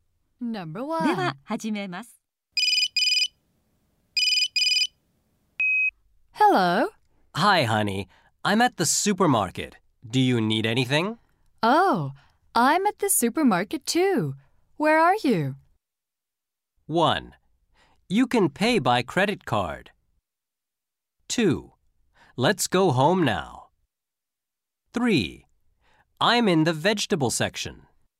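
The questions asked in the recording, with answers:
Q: Where are you?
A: 3: I'm in the vegetable section.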